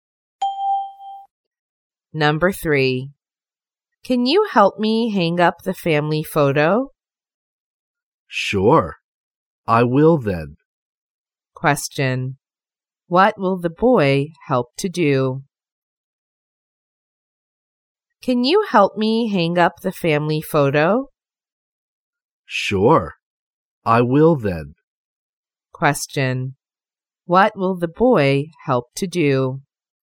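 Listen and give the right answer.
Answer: Hang up the family photo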